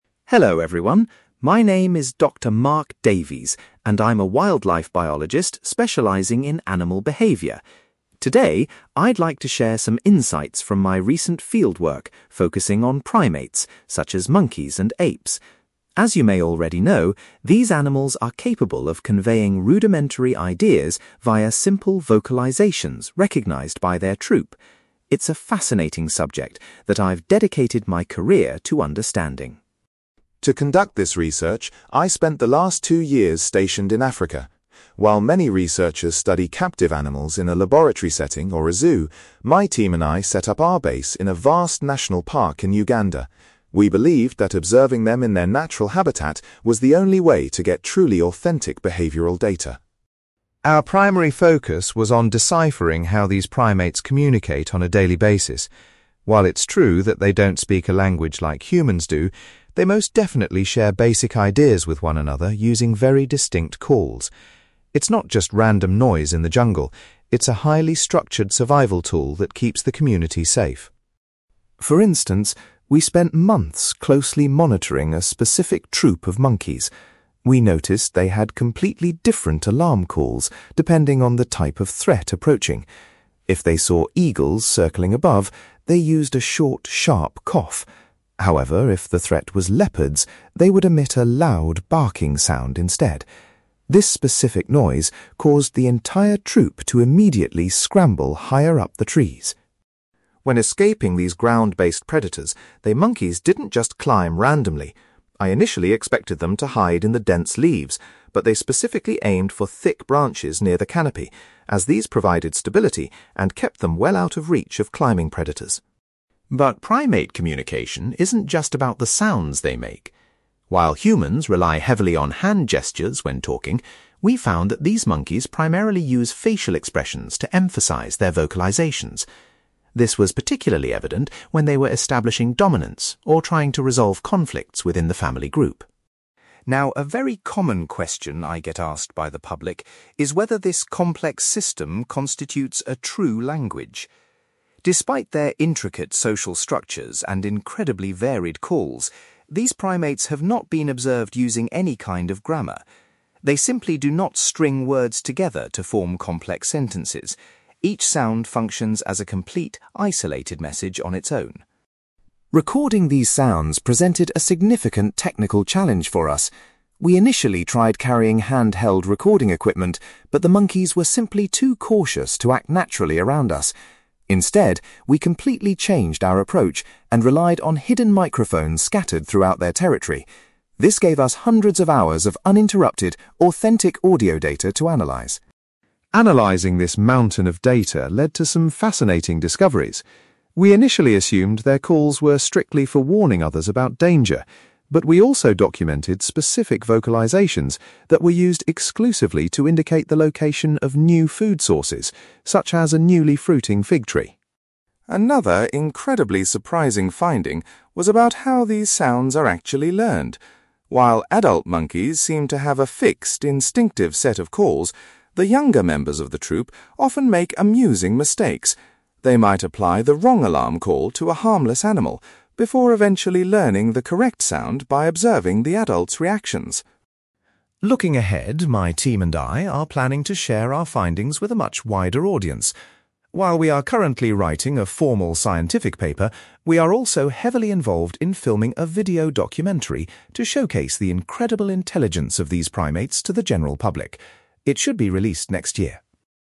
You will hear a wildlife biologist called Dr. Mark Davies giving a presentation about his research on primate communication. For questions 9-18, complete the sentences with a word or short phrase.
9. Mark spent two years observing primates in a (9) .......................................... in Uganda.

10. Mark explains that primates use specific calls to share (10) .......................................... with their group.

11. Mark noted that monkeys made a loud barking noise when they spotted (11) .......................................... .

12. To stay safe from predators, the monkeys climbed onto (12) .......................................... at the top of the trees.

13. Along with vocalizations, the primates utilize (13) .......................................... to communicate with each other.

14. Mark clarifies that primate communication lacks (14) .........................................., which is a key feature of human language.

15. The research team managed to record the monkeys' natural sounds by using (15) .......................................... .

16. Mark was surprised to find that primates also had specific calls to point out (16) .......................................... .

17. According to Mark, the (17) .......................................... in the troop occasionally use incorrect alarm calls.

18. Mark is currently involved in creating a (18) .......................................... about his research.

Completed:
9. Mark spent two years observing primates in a national park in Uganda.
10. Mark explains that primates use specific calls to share basic ideas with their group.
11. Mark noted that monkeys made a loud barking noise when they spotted leopards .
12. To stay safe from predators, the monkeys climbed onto thick branches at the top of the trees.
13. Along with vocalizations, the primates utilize facial expressions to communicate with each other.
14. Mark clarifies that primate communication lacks grammar, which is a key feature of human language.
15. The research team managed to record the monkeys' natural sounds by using hidden microphones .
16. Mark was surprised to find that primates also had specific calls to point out food sources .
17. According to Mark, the younger members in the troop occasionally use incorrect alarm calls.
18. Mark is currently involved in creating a video documentary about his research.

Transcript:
Mark: Hello, everyone. My name is Dr. Mark Davies, and I'm a wildlife biologist specializing in animal behavior. Today, I'd like to share some insights from my recent fieldwork focusing on primates, such as monkeys and apes. As you may already know, these animals are capable of conveying rudimentary ideas via simple vocalizations recognized by their troop. It's a fascinating subject that I've dedicated my career to understanding.
To conduct this research, I spent the last two years stationed in Africa. While many researchers study captive animals in a laboratory setting or a zoo, my team and I set up our base in a vast national park in Uganda. We believed that observing them in their natural habitat was the only way to get truly authentic behavioral data.
Our primary focus was on deciphering how these primates communicate on a daily basis. While it's true that they don't speak a language like humans do, they most definitely share basic ideas with one another using very distinct calls. It's not just random noise in the jungle; it's a highly structured survival tool that keeps the community safe.
For instance, we spent months closely monitoring a specific troop of monkeys. We noticed they had completely different alarm calls depending on the type of threat approaching. If they saw eagles circling above, they used a short, sharp cough. However, if the threat was leopards, they would emit a loud, barking sound instead. This specific noise caused the entire troop to immediately scramble higher up the trees.
When escaping these ground-based predators, the monkeys didn't just climb randomly. I initially expected them to hide in the dense leaves, but they specifically aimed for thick branches near the canopy, as these provided stability and kept them well out of reach of climbing predators.
But primate communication isn't just about the sounds they make. While humans rely heavily on hand gestures when talking, we found that these monkeys primarily use facial expressions to emphasize their vocalizations. This was particularly evident when they were establishing dominance or trying to resolve conflicts within the family group.
Now, a very common question I get asked by the public is whether this complex system constitutes a true language. Despite their intricate social structures and incredibly varied calls, these primates have not been observed using any kind of grammar. They simply do not string words together to form complex sentences; each sound functions as a complete, isolated message on its own.
Recording these sounds presented a significant technical challenge for us. We initially tried carrying handheld recording equipment, but the monkeys were simply too cautious to act naturally around us. Instead, we completely changed our approach and relied on hidden microphones scattered throughout their territory. This gave us hundreds of hours of uninterrupted, authentic audio data to analyze.
Analyzing this mountain of data led to some fascinating discoveries. We initially assumed their calls were strictly for warning others about danger, but we also documented specific vocalizations that were used exclusively to indicate the location of new food sources, such as a newly fruiting fig tree.
Another incredibly surprising finding was about how these sounds are actually learned. While adult monkeys seem to have a fixed, instinctive set of calls, the younger members of the troop often make amusing mistakes. They might apply the wrong alarm call to a harmless animal, before eventually learning the correct sound by observing the adults' reactions.
Looking ahead, my team and I are planning to share our findings with a much wider audience. While we are currently writing a formal scientific paper, we are also heavily involved in filming a video documentary to showcase the incredible intelligence of these primates to the general public. It should be released next year.

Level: B2